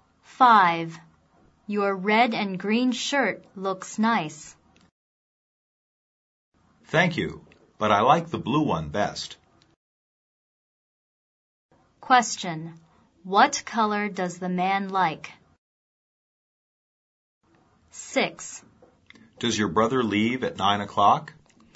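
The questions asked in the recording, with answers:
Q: What color does the man like?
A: Blue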